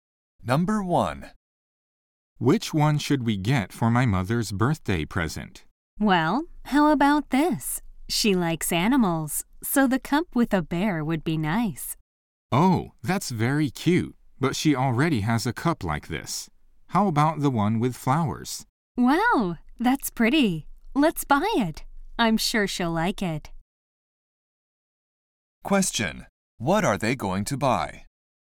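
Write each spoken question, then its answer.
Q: What are they going to buy?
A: The cup with flowers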